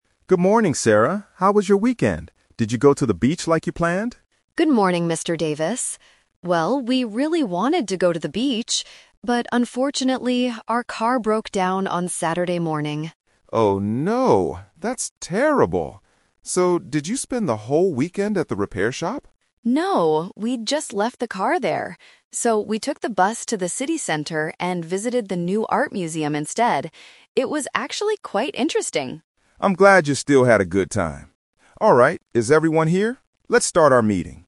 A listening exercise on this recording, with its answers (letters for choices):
Listen to the short conversation between a manager and his employee before a meeting. Then, circle the correct answer for each question.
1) What did Sarah want to do on the weekend?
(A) Visit a museum.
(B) Fix her car.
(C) Go to the beach.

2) Why did Sarah's plan change?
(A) Because her car stopped working.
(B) Because the weather was bad.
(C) Because she had to prepare for a meeting.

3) What did Sarah actually do?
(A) She stayed at the repair shop all day.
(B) She went to an art museum.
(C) She stayed home and rested.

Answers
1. C
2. A
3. B

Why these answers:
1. Mr. Davis asks, "Did you go to the beach like you planned?" and Sarah replies, "Well, we really wanted to go to the beach." Option (A) is the trap because it's what she did later, not what she wanted to do initially. Option (B) is a distracter based on the car breaking down.
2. Sarah says, "But unfortunately, our car broke down..." ("Broke down" means it stopped working). Option (B) is a common reason for not going to the beach, but it is not mentioned. Option (C) is a trap using the word "meeting" from the end of the dialogue.
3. Sarah explains, "So, we took the bus to the city center and visited the new art museum instead." Option (A) is the trap; Mr. Davis asks if she stayed at the repair shop, but she clearly says "No." Option (C) is never mentioned.

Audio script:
How was your weekend? Did you go to the beach like you planned?
Sarah: Good morning, Mr. Davis. Well, we really wanted to go to the beach. But unfortunately, our car broke down on Saturday morning.
Mr. Davis: Oh, no! That's terrible. So, did you spend the whole weekend at the repair shop?
Sarah: No, we just left the car there. So, we took the bus to the city center and visited the new art museum instead. It was actually quite interesting!
Mr.